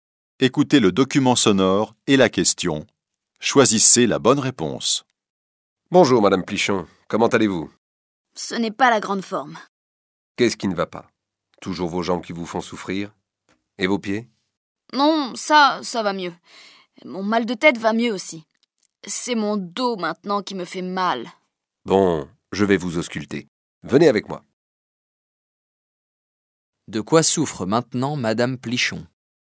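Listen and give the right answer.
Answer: Du dos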